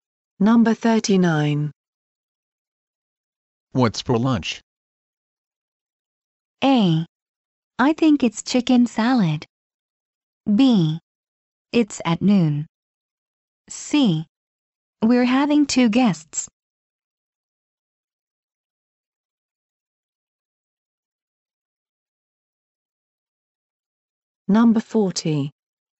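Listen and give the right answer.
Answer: A: I think it's chicken salad.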